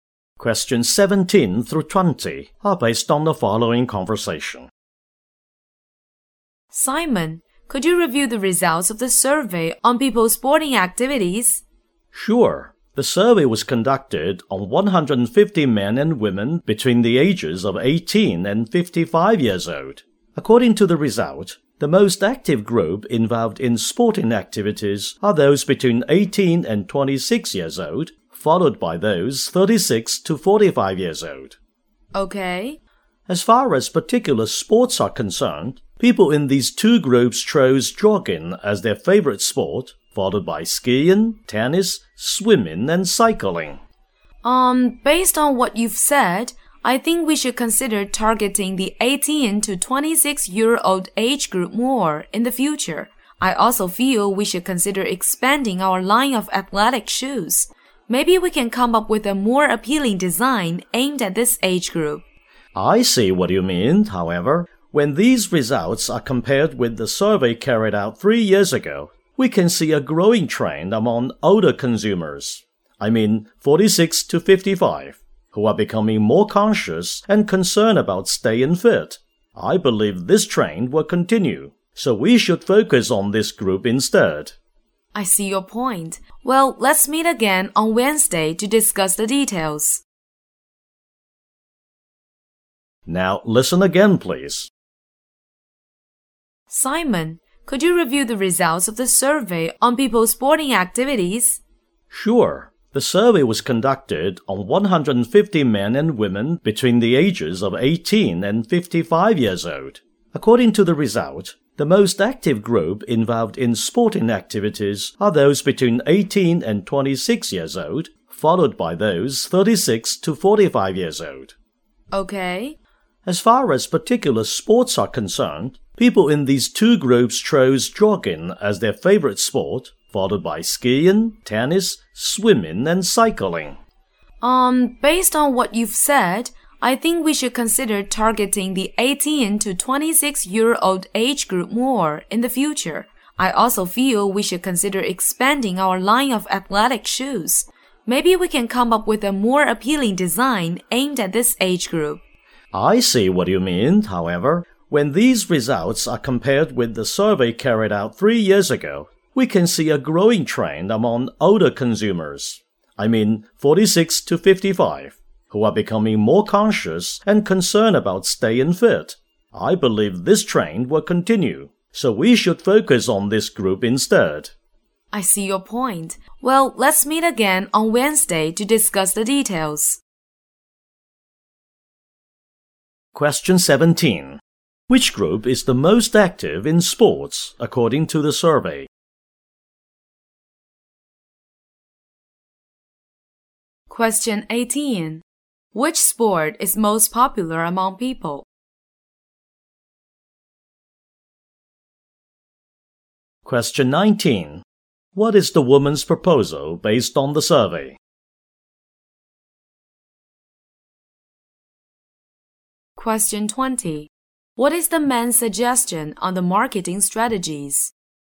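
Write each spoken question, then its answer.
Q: Which group is the most active in sports, according to the survey?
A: People aged 18 to 26

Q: Which sport is most popular among people?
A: Jogging

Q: What is the woman's proposal based on the survey?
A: Target the 18 to 26 age group and expand the line of athletic shoes

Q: What is the man's suggestion on the marketing strategies?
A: Focus on older consumers aged 46 to 55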